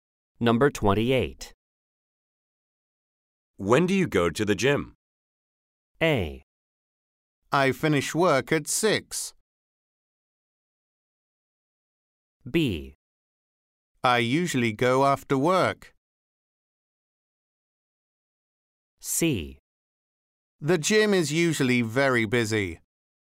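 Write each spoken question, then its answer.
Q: When do you go to the gym?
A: B: I usually go after work.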